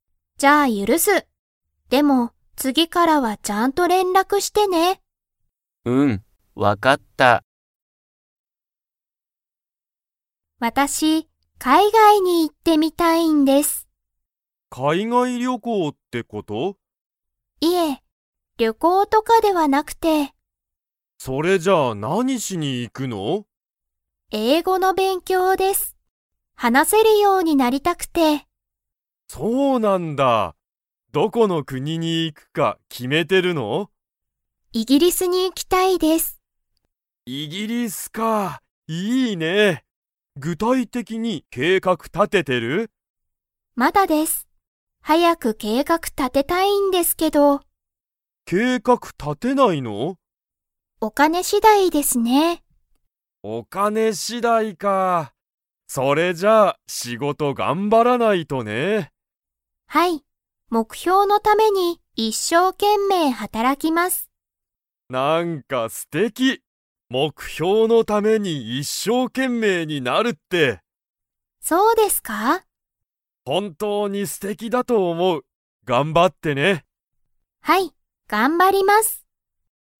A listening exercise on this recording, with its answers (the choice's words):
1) 佐々木ささきさんが、海外かいがいでしたいことは何なんですか?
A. 音楽おんがく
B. 仕事しごと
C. 旅行りょこう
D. 勉強べんきょう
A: 勉強べんきょう

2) 佐々木ささきさんは、具体的ぐたいてきに計画けいかくを 。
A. もう立たてた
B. まだ立たてていない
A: まだ立たてていない

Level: Level 4